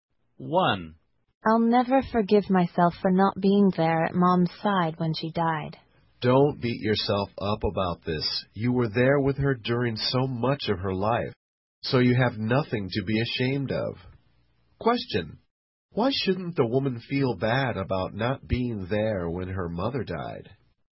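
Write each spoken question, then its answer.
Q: Why shouldn't the woman feel bad about not being there when her mother died?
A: She was with her mother during so much of her life.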